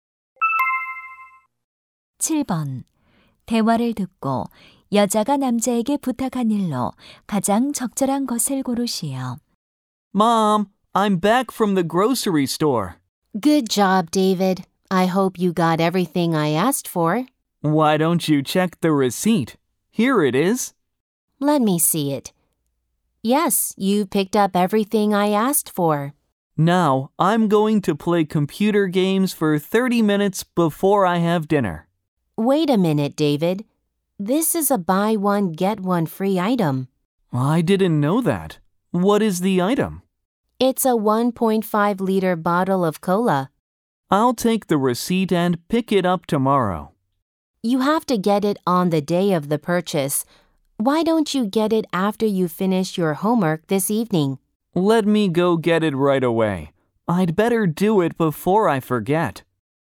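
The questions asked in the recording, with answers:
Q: 대화를 듣고 여자가 남자에게 부탁한 일로 가장 적절한 것을 고르시오.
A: 1+1 행사 콜라를 가져오기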